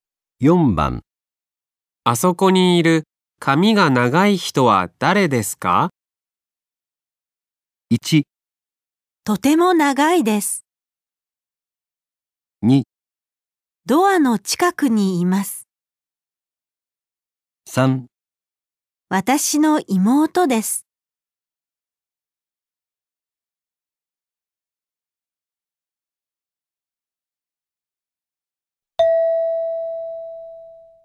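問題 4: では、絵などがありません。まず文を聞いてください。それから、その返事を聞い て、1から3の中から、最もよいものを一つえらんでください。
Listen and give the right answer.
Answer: 私の妹です。

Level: N5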